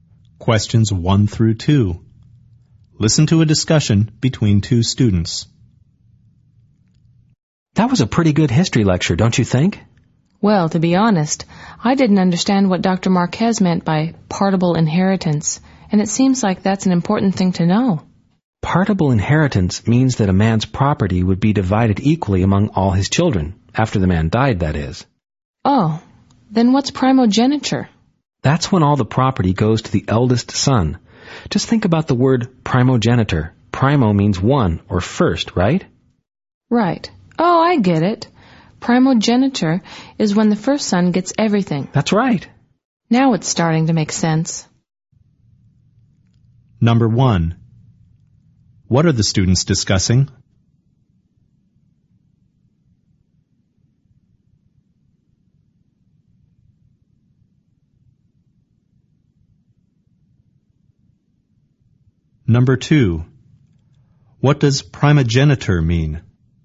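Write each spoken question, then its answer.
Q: What are the students discussing?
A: Terms from a history lecture about inheritance (partible inheritance and primogeniture)

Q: What does primogeniture mean?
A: All property goes to the eldest son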